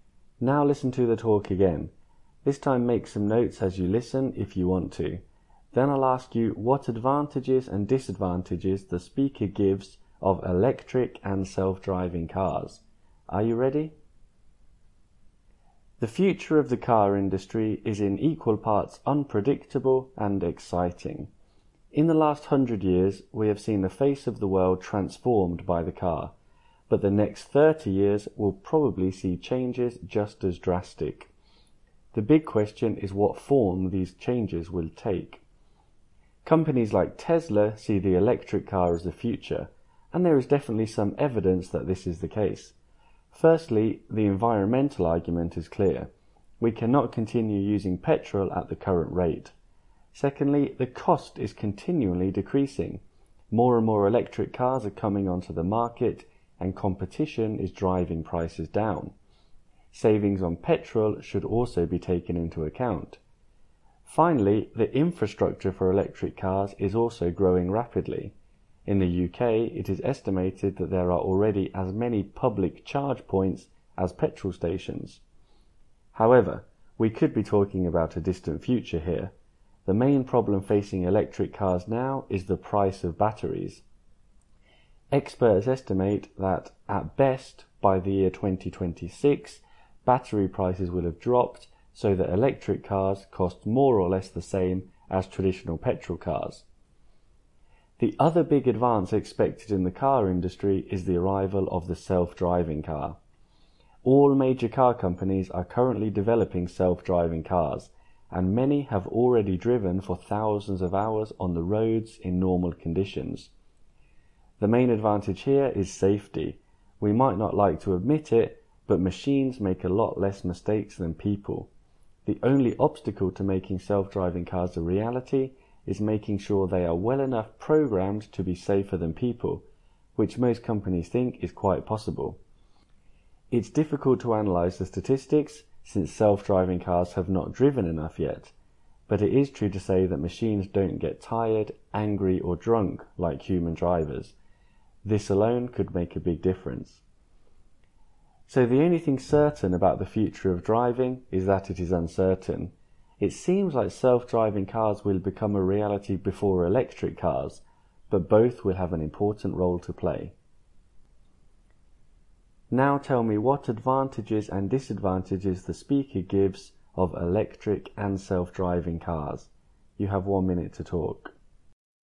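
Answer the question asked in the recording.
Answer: Electric: better for the environment, falling costs, petrol savings, growing charging network, but batteries are expensive. Self-driving: safer because machines make fewer mistakes, but they must be programmed well enough and there are not enough statistics yet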